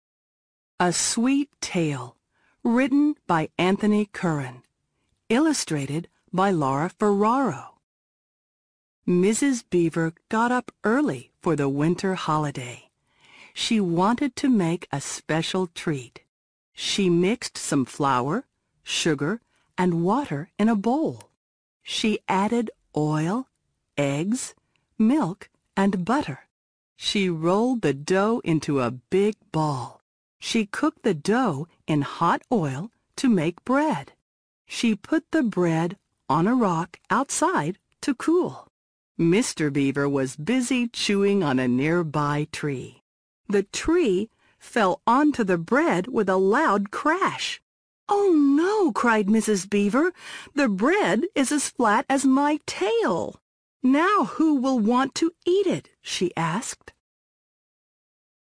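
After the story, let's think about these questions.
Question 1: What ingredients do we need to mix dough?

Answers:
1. flour, sugar, water, oil, eggs, milk and butter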